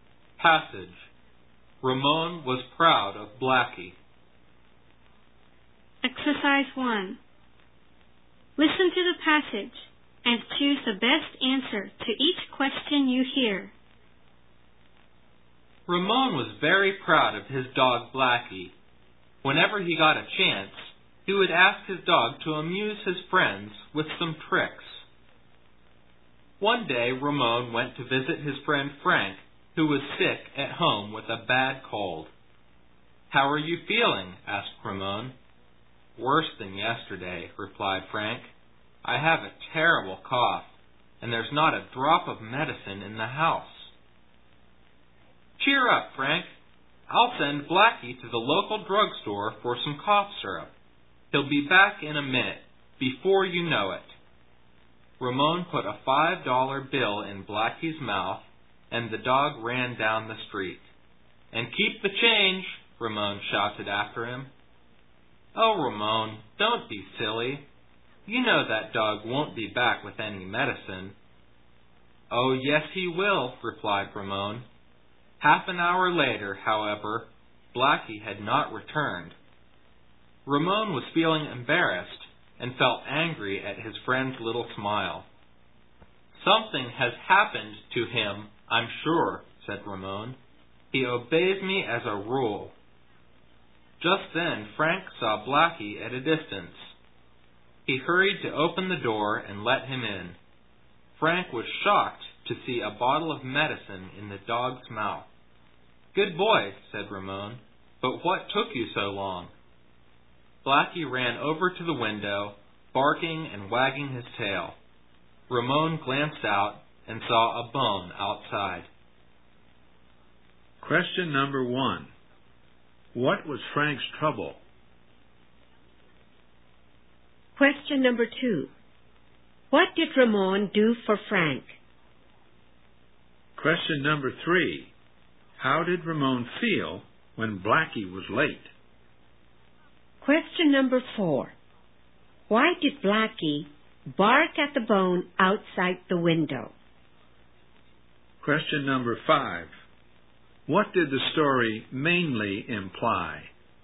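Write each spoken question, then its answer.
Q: What was Frank's trouble?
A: He had a bad cold and cough, and there was no medicine in the house

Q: What did Ramon do for Frank?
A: He sent Blackie to the drugstore to get cough syrup

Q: How did Ramon feel when Blackie was late?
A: Embarrassed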